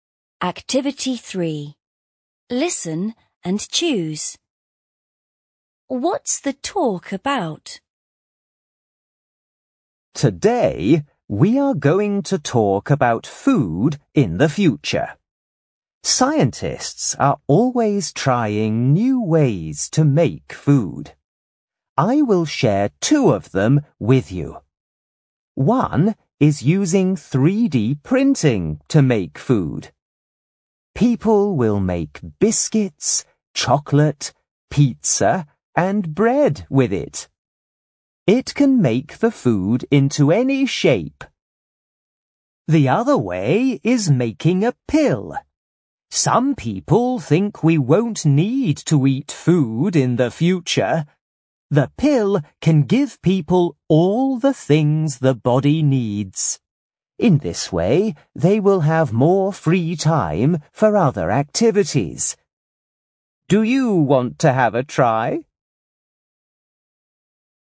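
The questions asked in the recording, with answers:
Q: What's the talk about?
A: Food in the future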